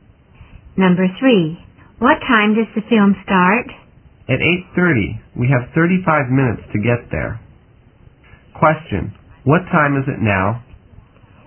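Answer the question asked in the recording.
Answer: 7:55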